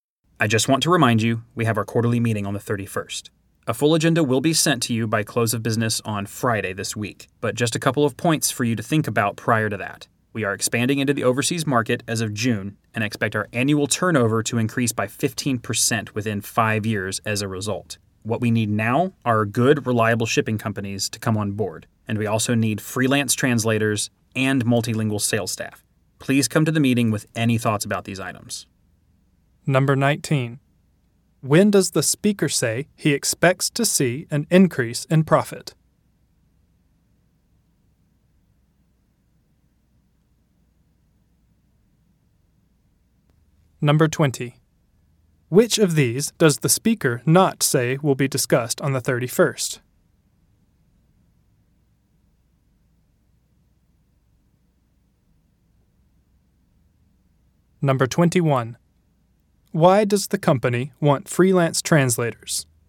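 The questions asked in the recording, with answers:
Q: When does the speaker say he expects to see an increase in profit?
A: Within 5 years

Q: Why does the company want freelance translators?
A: Because it is expanding into the overseas market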